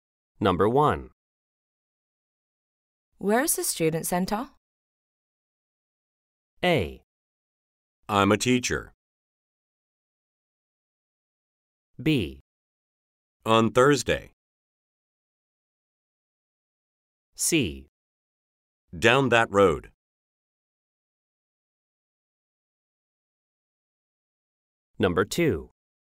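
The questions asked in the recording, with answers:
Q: Where is the student center?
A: C: Down that road.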